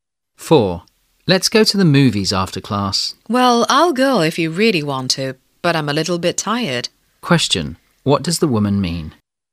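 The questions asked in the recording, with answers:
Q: What does the woman mean?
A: She is tired but will go if he really wants to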